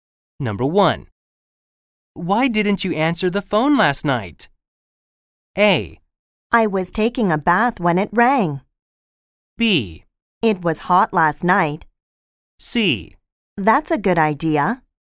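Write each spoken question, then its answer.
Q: Why didn't you answer the phone last night?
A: A: I was taking a bath when it rang.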